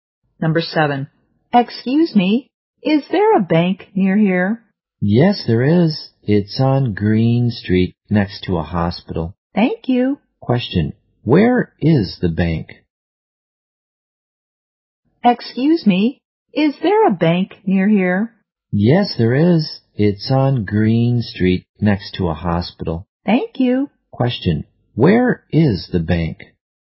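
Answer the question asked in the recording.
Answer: On Green Street, next to a hospital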